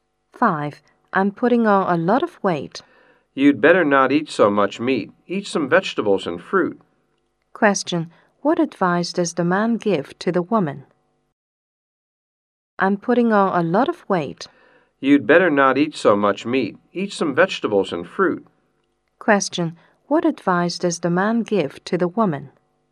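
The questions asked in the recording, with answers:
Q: What advice does the man give to the woman?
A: Eat less meat and more vegetables and fruit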